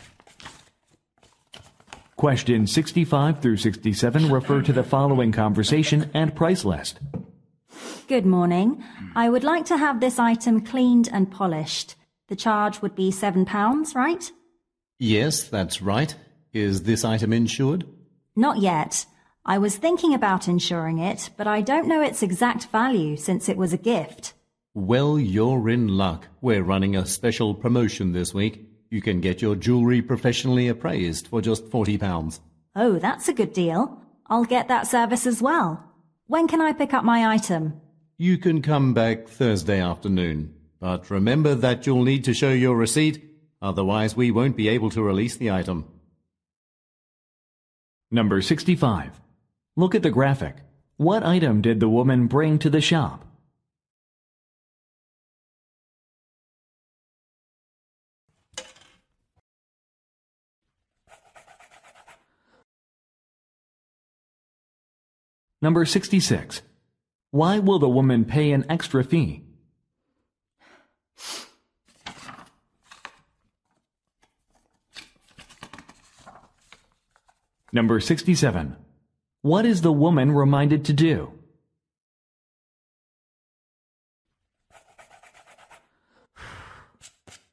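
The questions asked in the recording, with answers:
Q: Why will the woman pay an extra fee?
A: To have her jewelry appraised

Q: What is the woman reminded to do?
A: Bring her receipt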